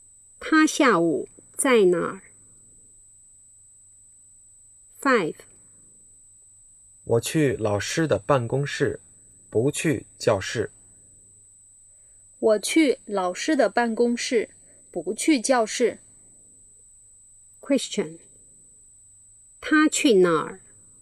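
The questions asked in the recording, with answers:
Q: 他去哪儿?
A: 老师的办公室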